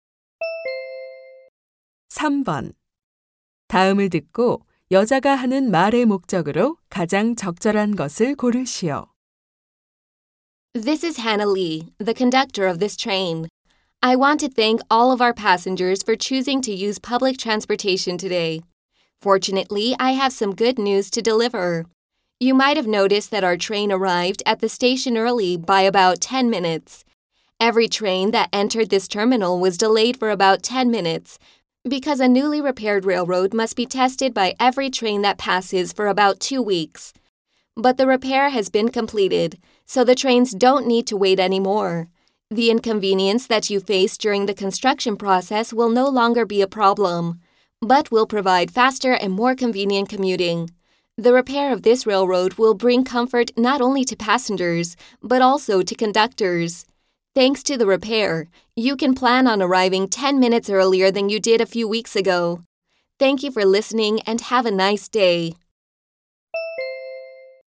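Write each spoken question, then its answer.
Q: 다음을 듣고 여자가 하는 말의 목적으로 가장 적절한 것을 고르시오.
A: 철로 보수 공사가 끝나 열차가 더 이상 지연되지 않음을 알리려고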